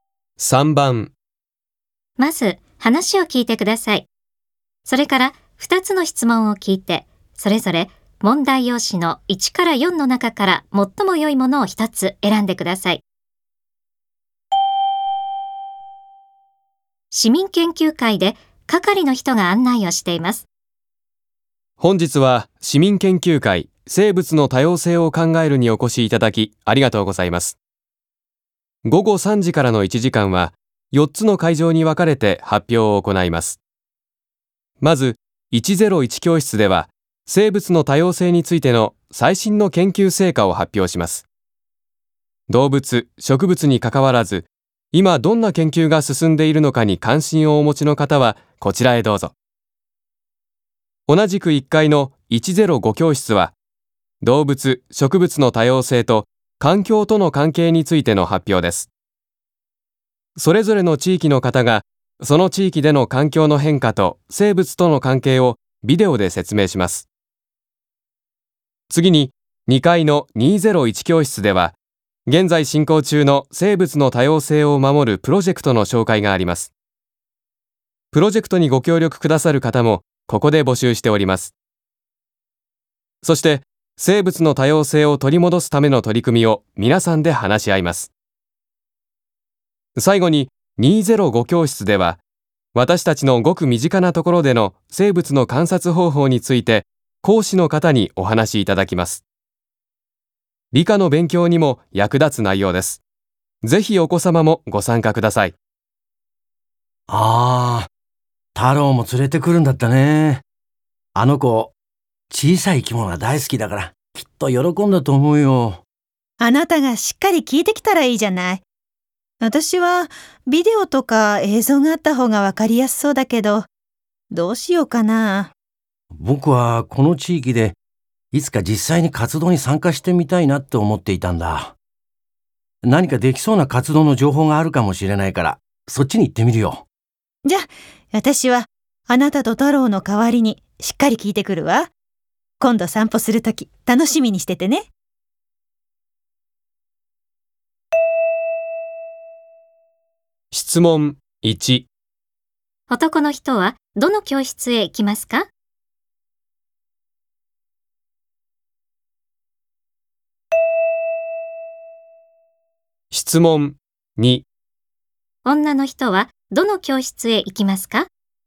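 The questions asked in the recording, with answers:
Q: 男の人はどの教室へ行きますか?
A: 201教室

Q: 女の人はどの教室へ行きますか?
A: 205教室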